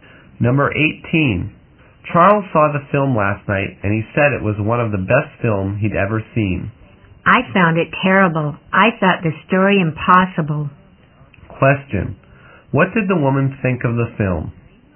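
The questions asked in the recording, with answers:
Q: Question, what did the woman think of the film?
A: She thought it was terrible.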